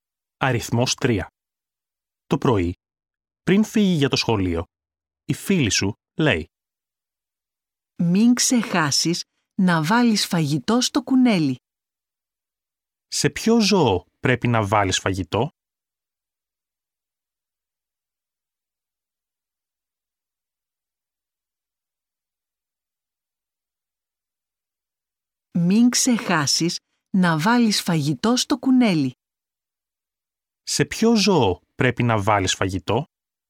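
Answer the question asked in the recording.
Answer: Στο κουνέλι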